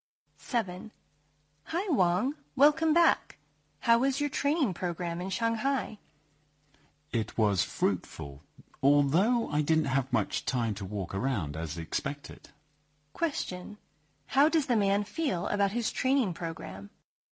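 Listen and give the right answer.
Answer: It was fruitful, though he had little time to walk around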